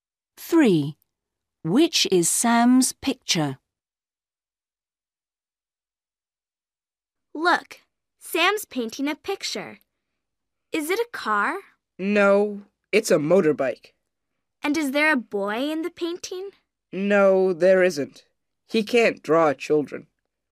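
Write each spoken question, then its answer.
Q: Which is Sam's picture?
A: a motorbike with no boy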